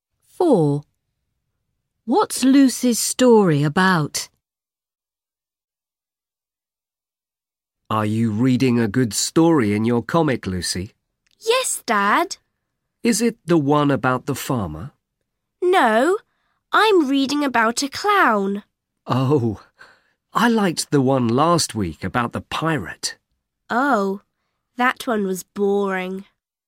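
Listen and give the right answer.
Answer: a clown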